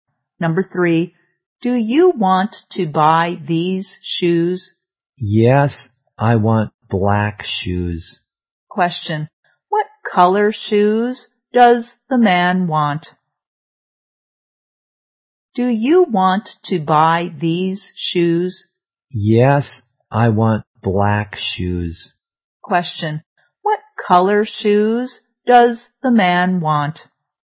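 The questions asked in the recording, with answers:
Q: Question, what color shoes does the man want?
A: Black.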